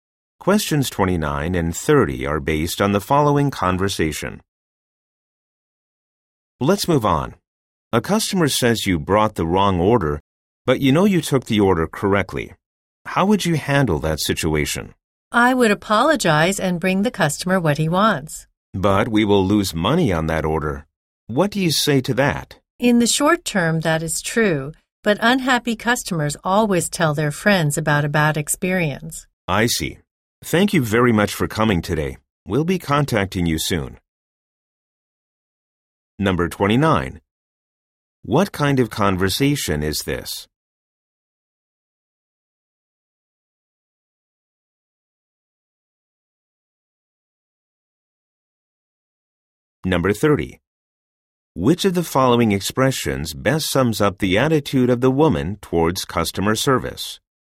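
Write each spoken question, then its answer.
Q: What kind of conversation is this?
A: A job interview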